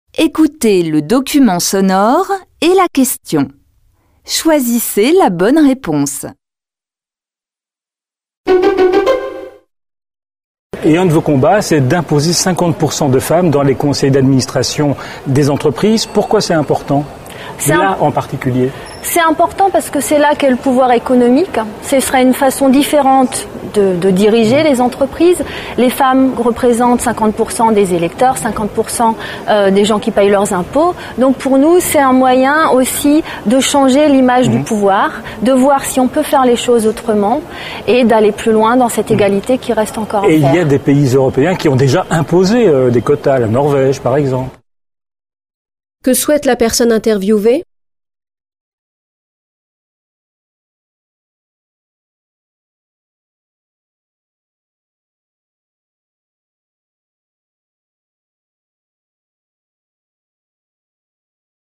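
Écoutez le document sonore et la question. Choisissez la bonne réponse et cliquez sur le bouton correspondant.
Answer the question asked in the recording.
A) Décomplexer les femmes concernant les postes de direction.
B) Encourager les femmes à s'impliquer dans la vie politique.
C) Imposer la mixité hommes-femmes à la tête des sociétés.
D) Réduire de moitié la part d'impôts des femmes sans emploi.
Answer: C) Imposer la mixité hommes-femmes à la tête des sociétés.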